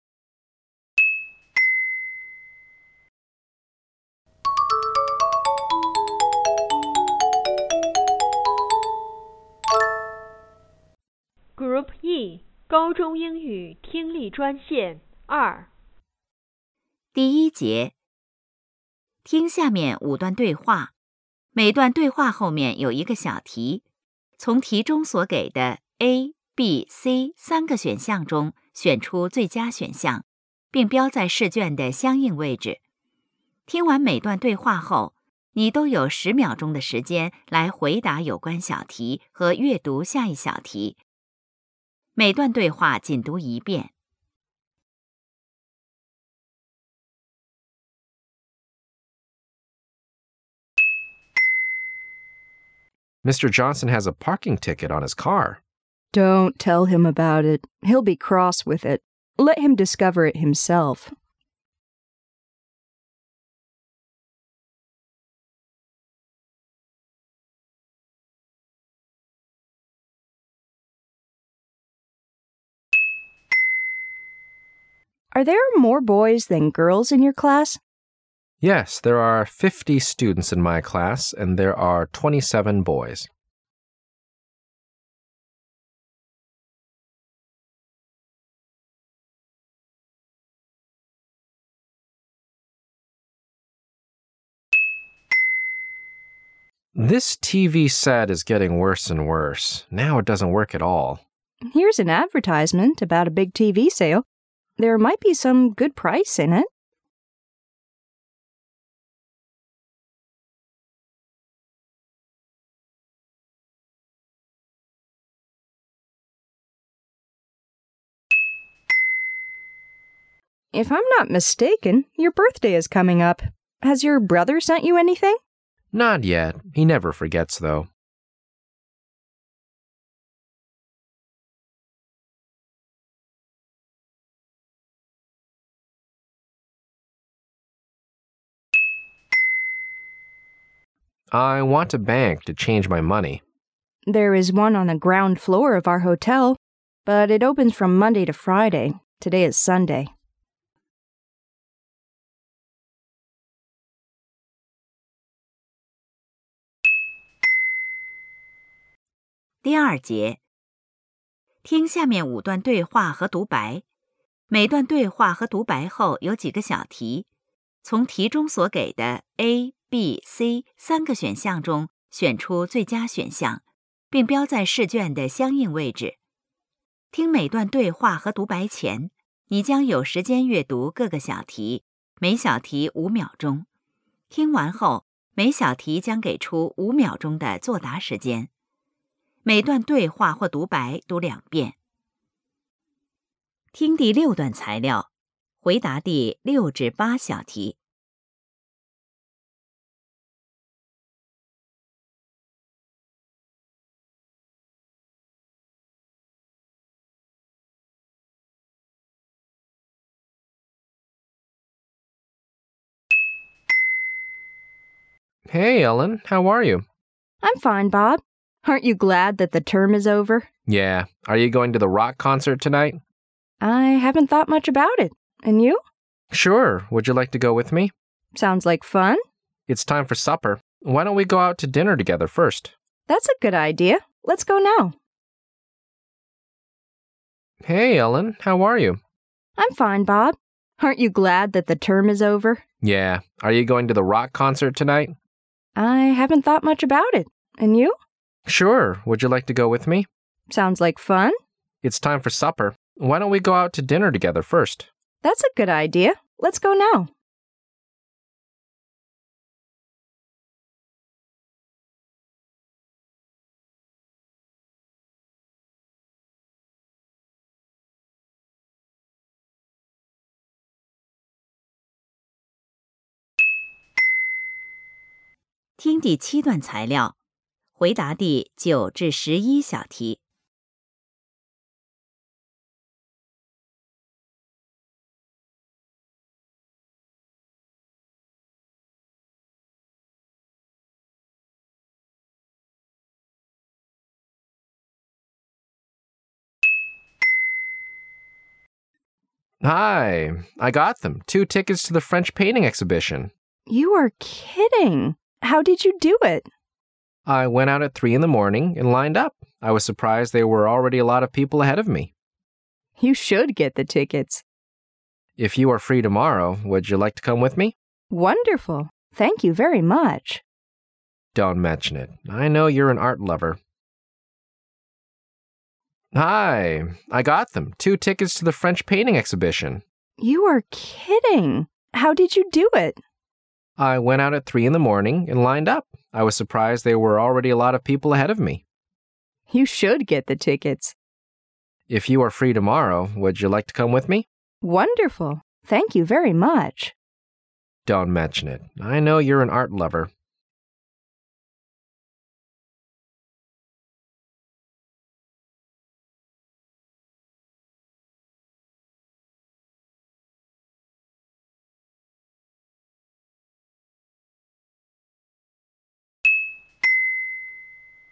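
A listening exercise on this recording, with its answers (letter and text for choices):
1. What can we learn about Mr. Johnson?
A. He will get angry at the parking ticket.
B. He is looking for a parking ticket.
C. He has to buy a parking ticket.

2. How many girls are there in the man's class?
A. 27.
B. 30.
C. 23.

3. What 's the woman probably doing?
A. Reading a newspaper.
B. Buying a new TV set.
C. Watching a movie.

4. What do we know about the man?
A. He expects to hear from his brother.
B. His birthday is two weeks away.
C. He is sure of a present from his brother.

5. Where does this conversation most probably take place?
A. In a bank.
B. In a hotel.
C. In a park.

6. When does this conversation take place?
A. At the beginning of the term.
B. At the end of the school year.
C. In the middle of the summer vacation.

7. Where do Bob and Ellen want to go?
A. To a movie at the student center.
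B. To an opera at a concert hall.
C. To a popular music concert.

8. What are they going to do first?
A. To buy two tickets.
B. To have supper.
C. To go to the concert.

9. How did the man get the tickets?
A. By asking for the m from a friend.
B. By lining up in front of the ticket office.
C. By buying them from someone who changed his mind.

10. What can you learn about the exhibition?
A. It is very popular with the people.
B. It is so boring that one can easily get a ticket.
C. It is good but few people like to see it.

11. What's the probable result of the conversation?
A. The two speakers will go to the exhibition together.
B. The man will go there wit h someone else.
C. The woman will go there with someone else.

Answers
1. A. He will get angry at the parking ticket.
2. C. 23.
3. A. Reading a newspaper.
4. C. He is sure of a present from his brother.
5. B. In a hotel.
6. B. At the end of the school year.
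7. C. To a popular music concert.
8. B. To have supper.
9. B. By lining up in front of the ticket office.
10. A. It is very popular with the people.
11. A. The two speakers will go to the exhibition together.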